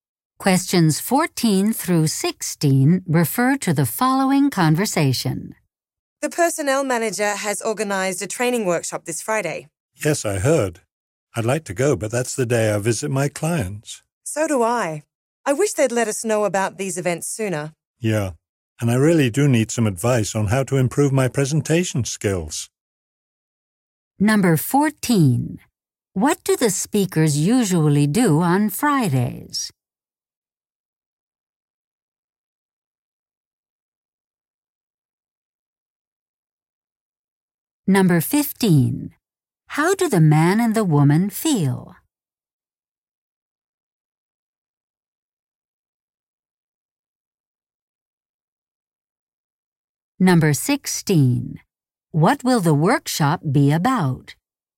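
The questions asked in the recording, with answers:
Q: What do the speakers usually do on Fridays?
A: Visit clients

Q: How do the man and the woman feel?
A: Frustrated that they weren't informed sooner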